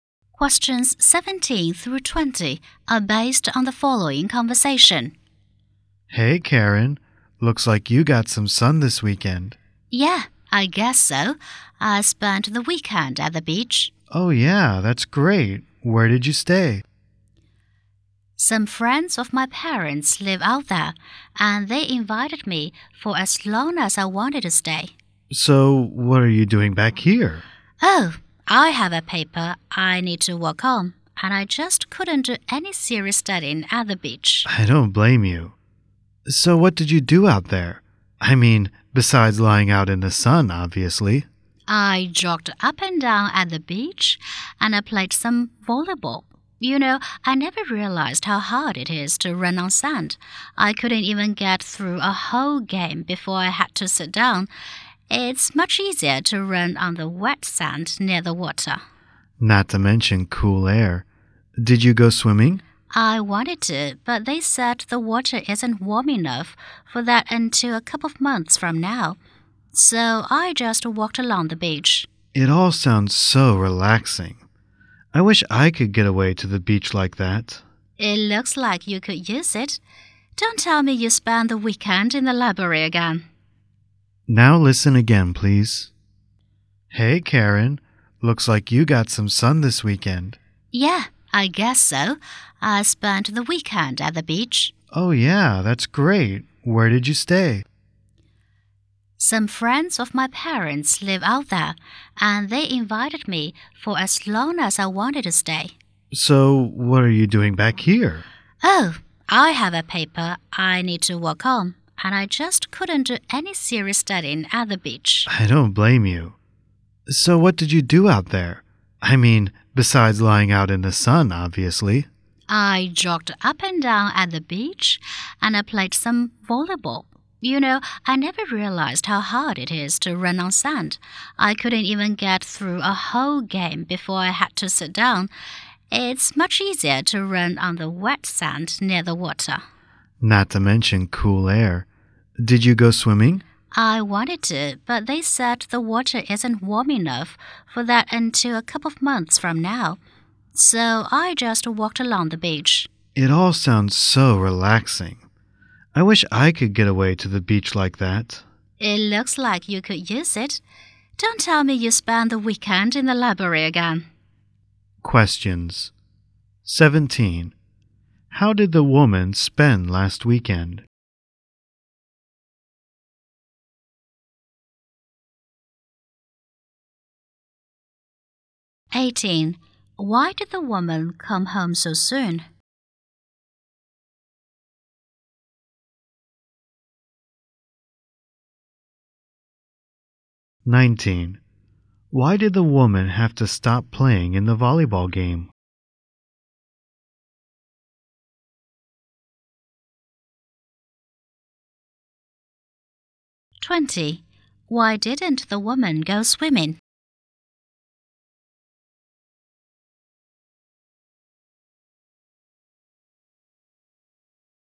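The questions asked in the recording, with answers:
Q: How did the woman spend last weekend?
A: At the beach

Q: Why did the woman come home so soon?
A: She had a paper to work on

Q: Why did the woman have to stop playing in the volleyball game?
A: Running on sand was too hard for her

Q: Why didn't the woman go swimming?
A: The water wasn't warm enough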